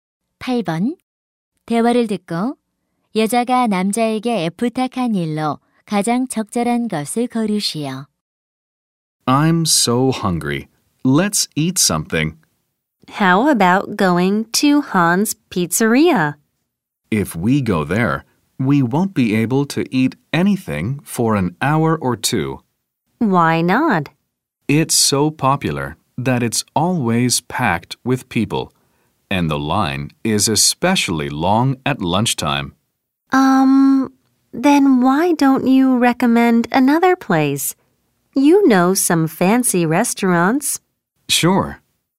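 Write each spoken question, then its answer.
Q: 대화를 듣고 여자가 남자에게 부탁한 일로 가장 적절한 것을 고르시오.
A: 다른 식당을 추천해 주기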